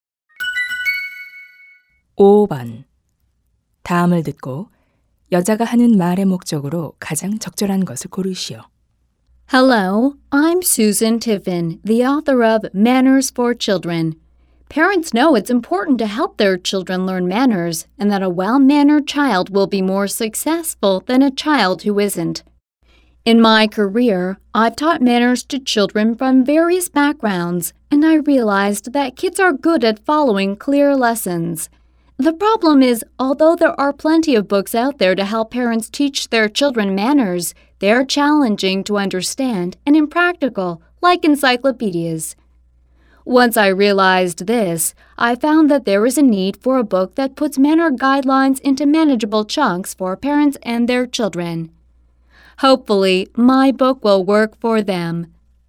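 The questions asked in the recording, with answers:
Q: 다음을 듣고 여자가 하는 말의 목적으로 가장 적절한 것을 고르시오.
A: 아이 예절 교육을 위한 자신의 책을 소개하려고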